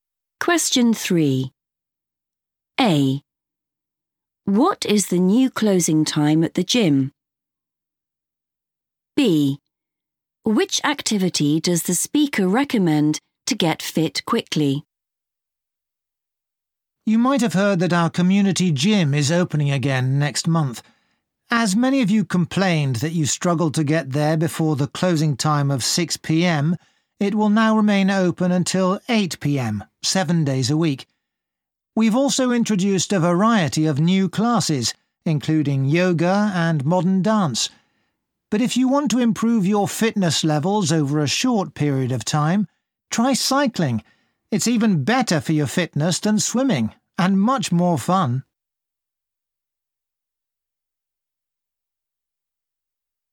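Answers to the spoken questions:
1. 8 p.m.
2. cycling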